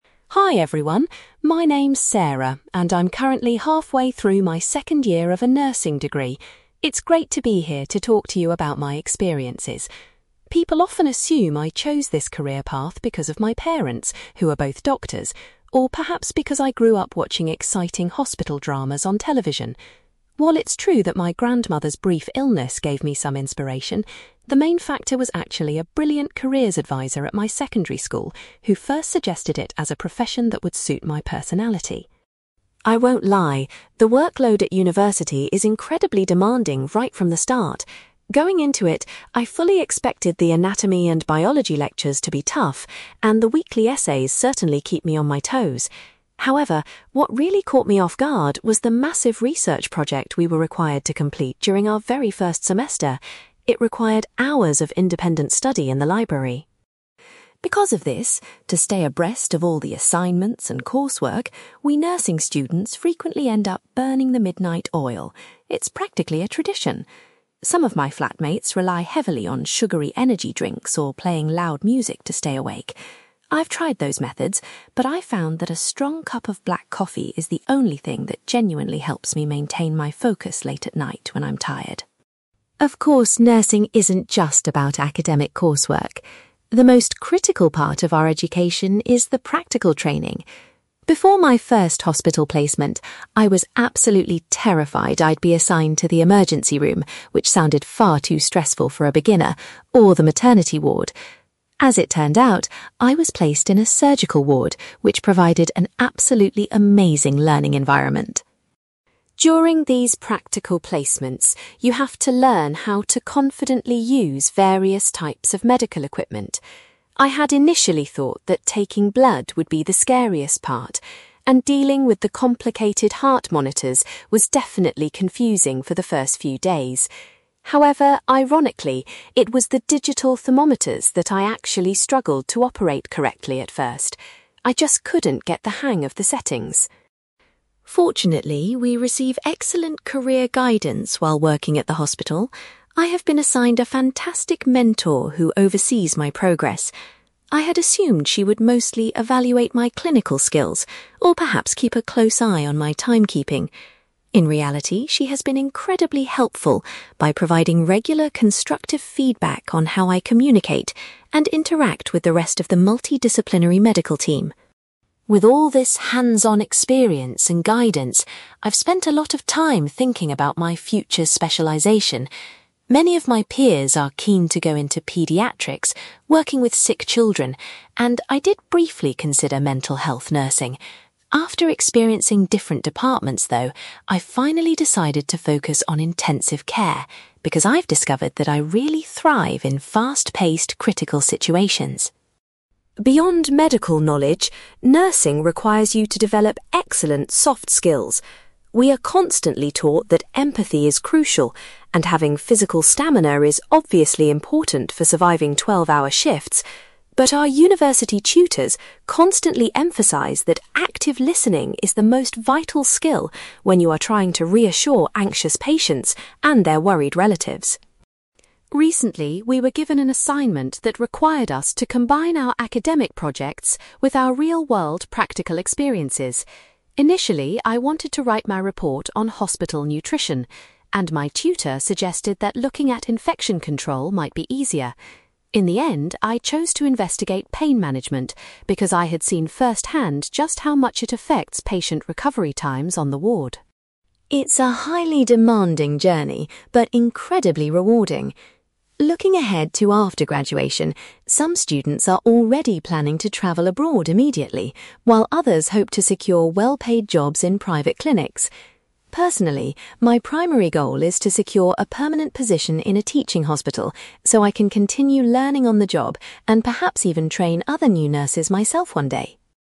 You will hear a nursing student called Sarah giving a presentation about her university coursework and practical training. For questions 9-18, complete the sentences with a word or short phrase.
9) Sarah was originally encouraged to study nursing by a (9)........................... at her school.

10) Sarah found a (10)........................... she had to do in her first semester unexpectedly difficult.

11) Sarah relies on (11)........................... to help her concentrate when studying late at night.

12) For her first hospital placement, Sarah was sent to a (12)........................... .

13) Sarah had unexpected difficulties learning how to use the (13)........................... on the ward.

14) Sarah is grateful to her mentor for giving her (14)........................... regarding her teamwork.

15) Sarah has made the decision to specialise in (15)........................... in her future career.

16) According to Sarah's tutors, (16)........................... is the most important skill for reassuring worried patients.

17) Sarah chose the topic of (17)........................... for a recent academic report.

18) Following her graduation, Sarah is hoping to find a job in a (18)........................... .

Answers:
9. careers advisor
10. research project
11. black coffee
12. surgical ward
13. digital thermometers
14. constructive feedback
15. intensive care
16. active listening
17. pain management
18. teaching hospital

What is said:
Sarah: Hi everyone, my name is Sarah, and I'm currently halfway through my second year of a nursing degree. It's great to be here to talk to you about my experiences. People often assume I chose this career path because of my parents, who are both doctors, or perhaps because I grew up watching exciting hospital dramas on television. While it's true that my grandmother's brief illness gave me some inspiration, the main factor was actually a brilliant careers advisor at my secondary school who first suggested it as a profession that would suit my personality.
I won't lie, the workload at university is incredibly demanding right from the start. Going into it, I fully expected the anatomy and biology lectures to be tough, and the weekly essays certainly keep me on my toes. However, what really caught me off guard was the massive research project we were required to complete during our very first semester. It required hours of independent study in the library.
Because of this, to stay abreast of all the assignments and coursework, we nursing students frequently end up burning the midnight oil. It's practically a tradition! Some of my flatmates rely heavily on sugary energy drinks or playing loud music to stay awake. I've tried those methods, but I found that a strong cup of black coffee is the only thing that genuinely helps me maintain my focus late at night when I'm tired.
Of course, nursing isn't just about academic coursework. The most critical part of our education is the practical training. Before my first hospital placement, I was absolutely terrified I'd be assigned to the emergency room, which sounded far too stressful for a beginner, or the maternity ward. As it turned out, I was placed in a surgical ward, which provided an absolutely amazing learning environment.
During these practical placements, you have to learn how to confidently use various types of medical equipment. I had initially thought that taking blood would be the scariest part, and dealing with the complicated heart monitors was definitely confusing for the first few days. However, ironically, it was the digital thermometers that I actually struggled to operate correctly at first! I just couldn't get the hang of the settings.
Fortunately, we receive excellent career guidance while working at the hospital. I have been assigned a fantastic mentor who oversees my progress. I had assumed she would mostly evaluate my clinical skills or perhaps keep a close eye on my timekeeping. In reality, she has been incredibly helpful by providing regular constructive feedback on how I communicate and interact with the rest of the multidisciplinary medical team.
With all this hands-on experience and guidance, I've spent a lot of time thinking about my future specialization. Many of my peers are keen to go into pediatrics, working with sick children, and I did briefly consider mental health nursing. After experiencing different departments, though, I've finally decided to focus on intensive care because I've discovered that I really thrive in fast-paced, critical situations.
Beyond medical knowledge, nursing requires you to develop excellent soft skills. We are constantly taught that empathy is crucial, and having physical stamina is obviously important for surviving twelve-hour shifts. But our university tutors constantly emphasize that active listening is the most vital skill when you are trying to reassure anxious patients and their worried relatives.
Recently, we were given an assignment that required us to combine our academic projects with our real-world practical experiences. Initially, I wanted to write my report on hospital nutrition, and my tutor suggested that looking at infection control might be easier. In the end, I chose to investigate pain management because I had seen firsthand just how much it affects patient recovery times on the ward.
It's a highly demanding journey, but incredibly rewarding. Looking ahead to after graduation, some students are already planning to travel abroad immediately, while others hope to secure well-paid jobs in private clinics. Personally, my primary goal is to secure a permanent position in a teaching hospital so I can continue learning on the job and perhaps even train other new nurses myself one day.

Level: B2